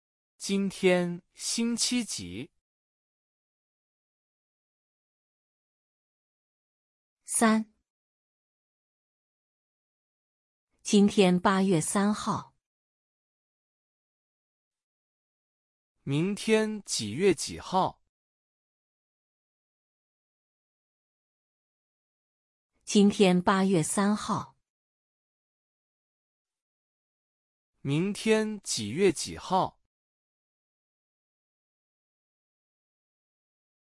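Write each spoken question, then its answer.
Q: 明天几月几号?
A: 八月四号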